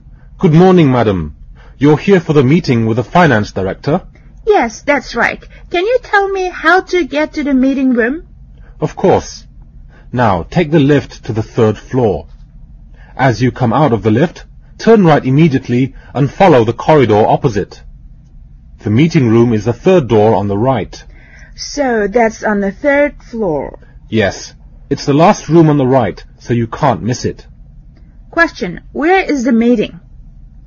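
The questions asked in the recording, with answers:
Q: Where is the meeting?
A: In the meeting room on the 3rd floor, last room on the right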